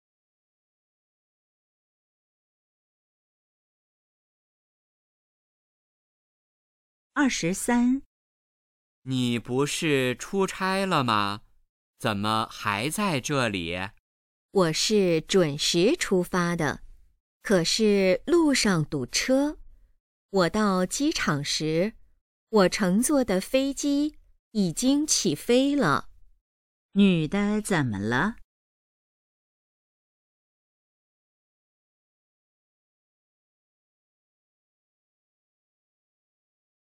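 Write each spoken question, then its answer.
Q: 女的怎么了?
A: 没赶上飞机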